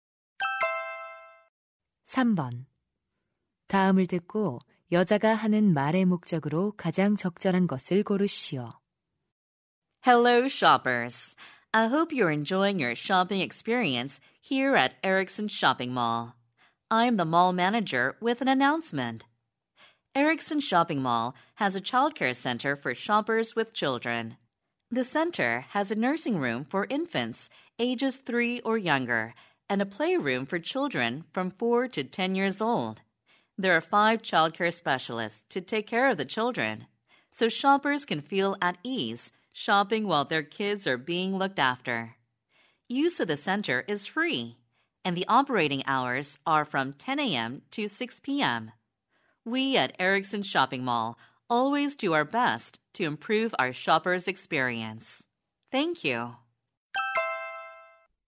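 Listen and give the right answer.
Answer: 쇼핑몰 내 어린이 돌봄 센터를 안내하려고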